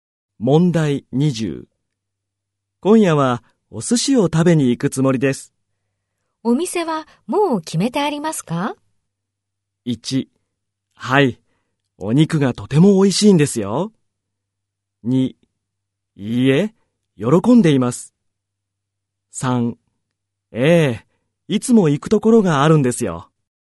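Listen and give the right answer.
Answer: 3: ええ、いつも行くところがあるんですよ。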